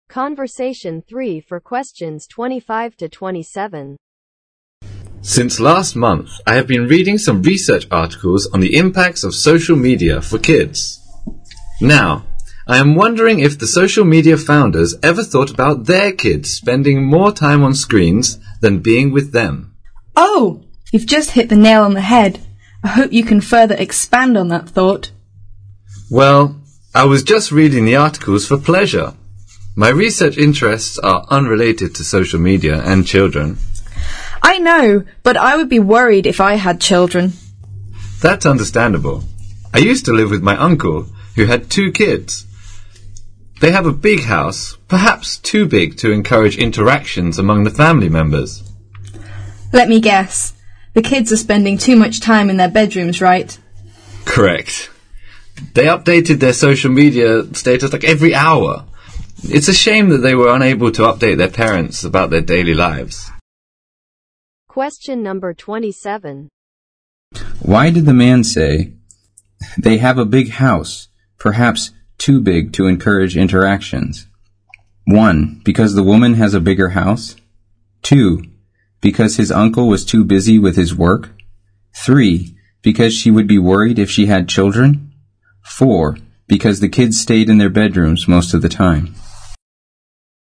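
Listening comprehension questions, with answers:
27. Why did the man say" They have a big house, perhaps too big to encourage interactions."?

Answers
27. Because the kids stayed in their bedrooms most of the time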